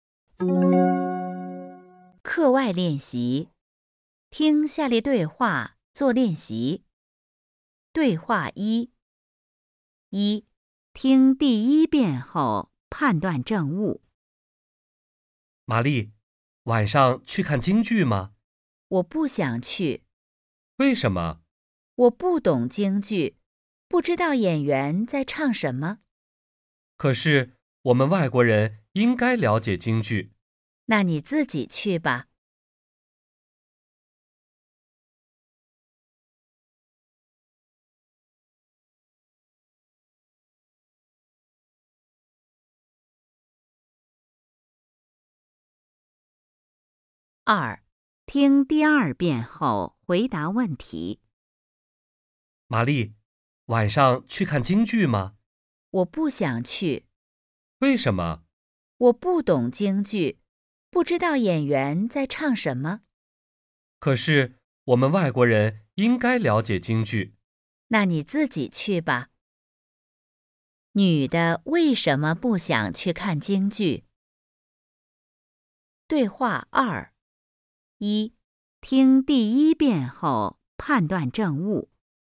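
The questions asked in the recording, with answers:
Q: 女的为什么不想去看京剧?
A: 她不懂京剧,不知道演员在唱什么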